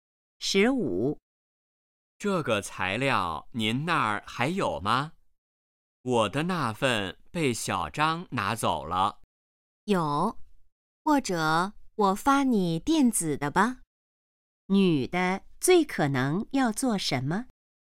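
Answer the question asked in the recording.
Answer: 发电子材料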